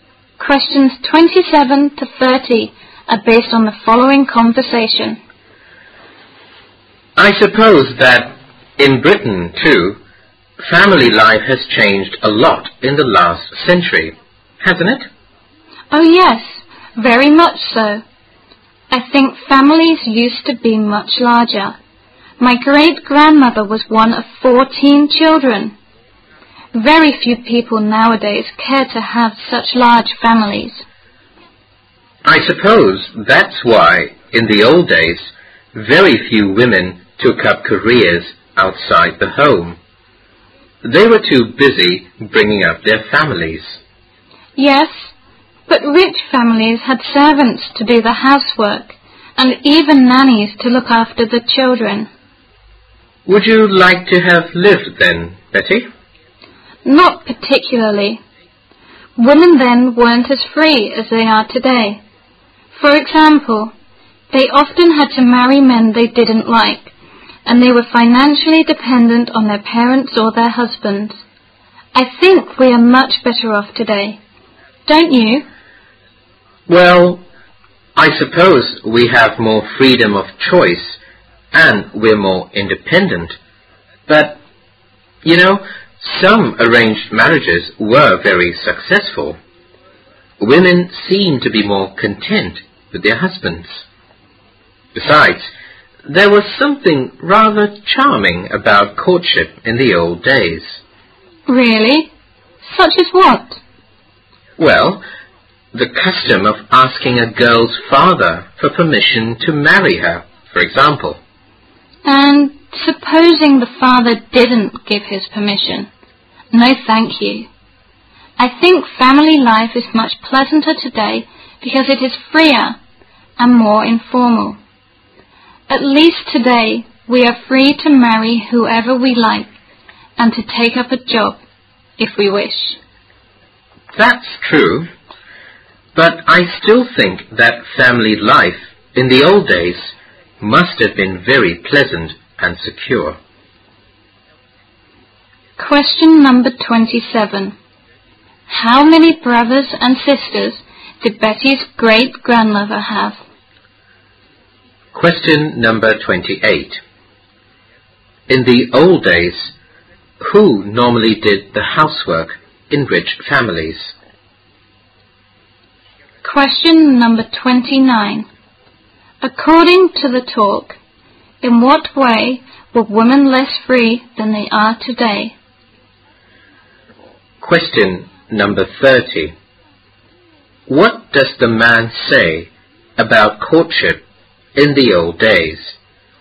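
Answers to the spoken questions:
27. 13
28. Servants
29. They often had to marry men they didn't like and depended financially on their parents or husbands.
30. There was something rather charming about it.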